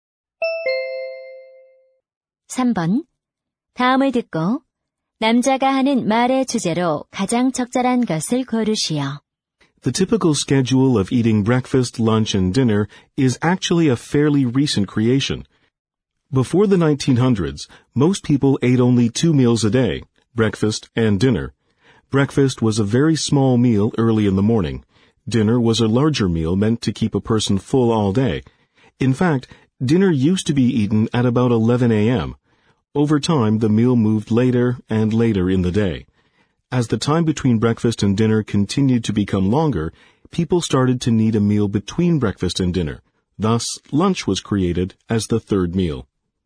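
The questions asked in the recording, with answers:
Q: 다음을 듣고 남자가 하는 말의 주제로 가장 적절한 것을 고르시오.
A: 점심 식사가 생겨난 유래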